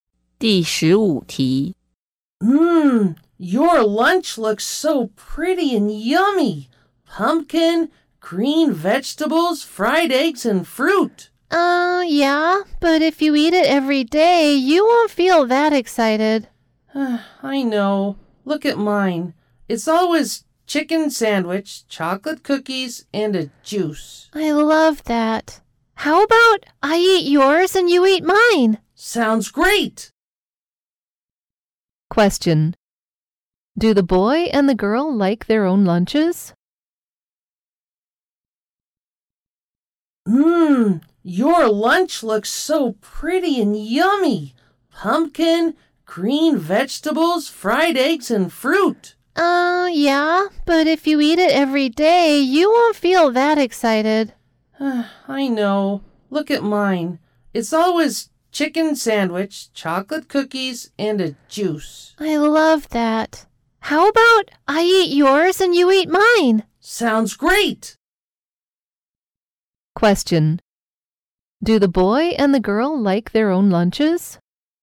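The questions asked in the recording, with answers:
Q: Do the boy and the girl like their own lunches?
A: No, each prefers the other's lunch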